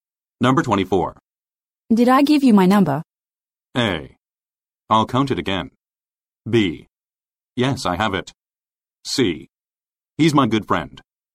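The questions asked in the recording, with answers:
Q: Did I give you my number?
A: B: Yes, I have it.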